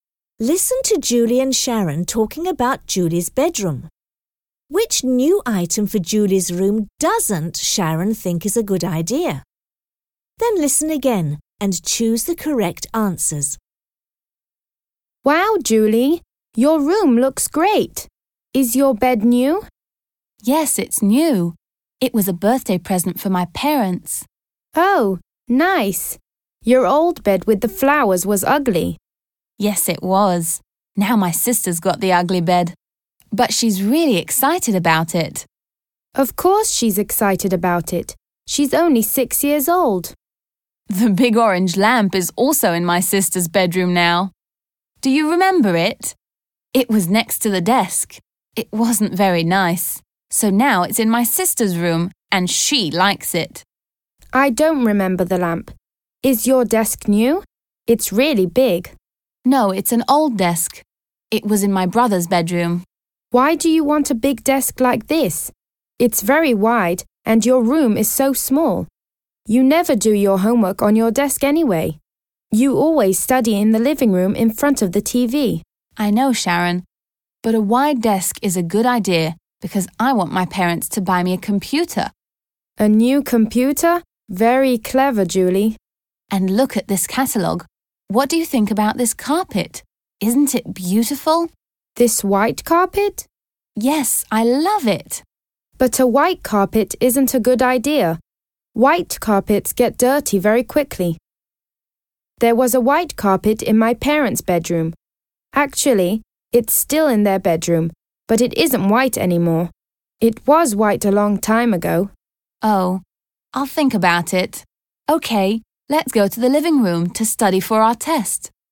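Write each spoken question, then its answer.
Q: Which new item for Julie's room doesn't Sharon think is a good idea?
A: The white carpet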